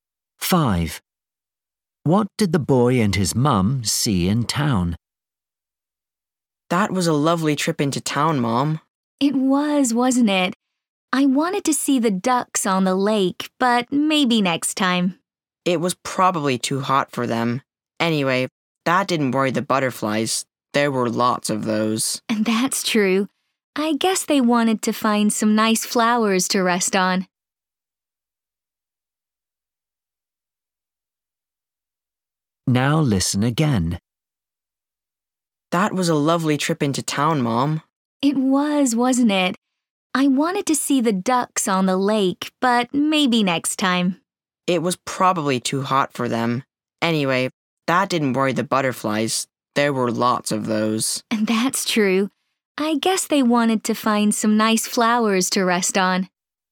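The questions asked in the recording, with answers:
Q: What did the boy and his mum see in town?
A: Butterflies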